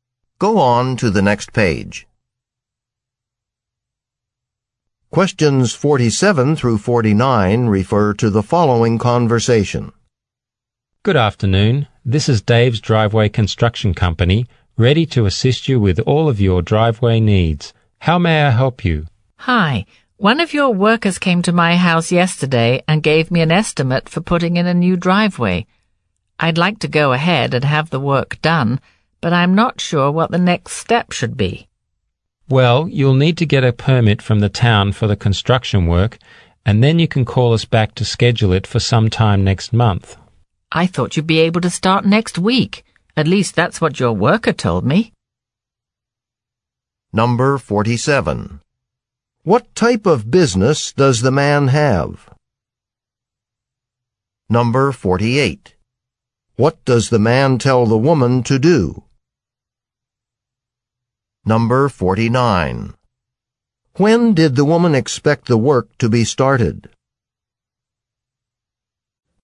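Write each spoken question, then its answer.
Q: What type of business does the man have?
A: Driveway construction company

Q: What does the man tell the woman to do?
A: Get a permit from the town

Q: When did the woman expect the work to be started?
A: Next week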